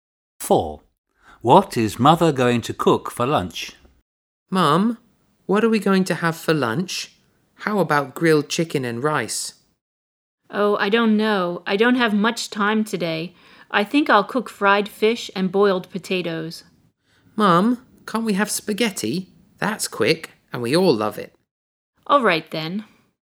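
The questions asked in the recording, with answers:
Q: What is Mother going to cook for lunch?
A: spaghetti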